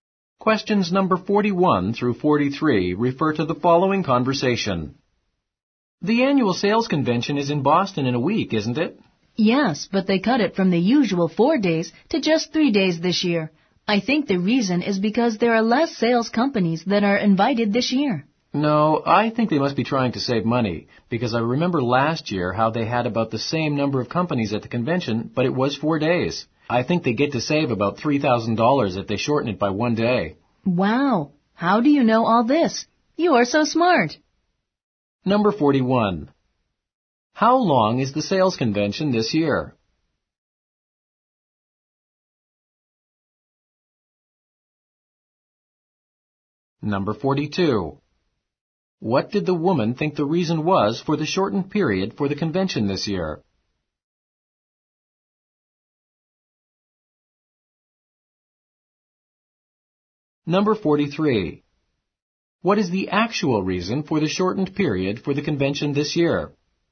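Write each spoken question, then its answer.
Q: How long is the sales convention this year?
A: 3 days

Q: What did the woman think the reason was for the shortened period for the convention this year?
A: Fewer sales companies were invited

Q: What is the actual reason for the shortened period for the convention this year?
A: To save money (about $3,000)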